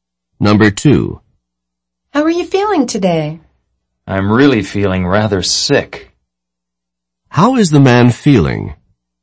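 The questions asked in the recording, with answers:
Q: How is the man feeling?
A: Rather sick.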